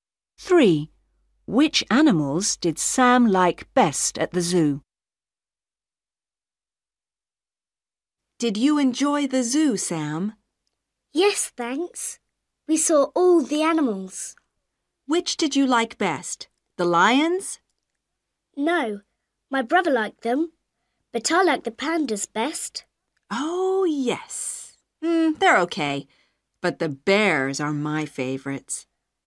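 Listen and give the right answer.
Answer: The pandas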